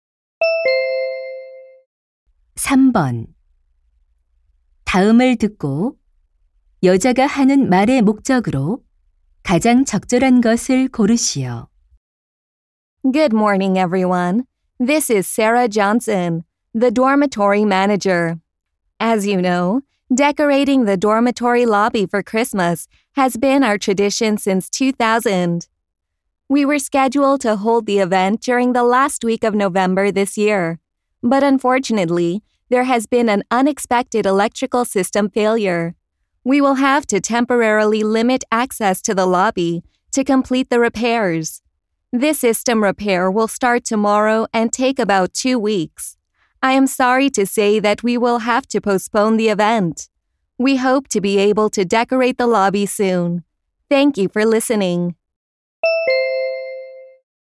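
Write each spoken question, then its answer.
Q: 다음을 듣고 여자가 하는 말의 목적으로 가장 적절한 것을 고르시오.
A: 기숙사 로비 크리스마스 장식 행사 연기를 알리려고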